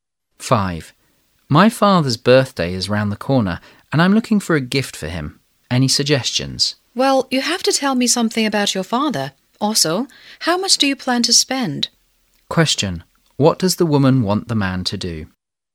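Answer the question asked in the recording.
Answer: Tell her about his father and his budget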